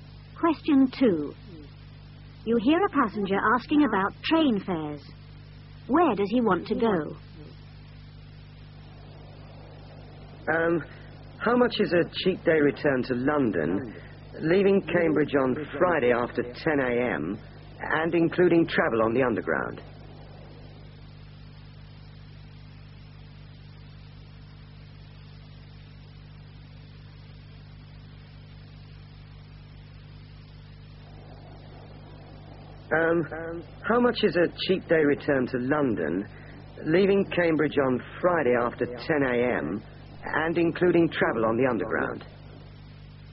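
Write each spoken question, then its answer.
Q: Where does he want to go?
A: London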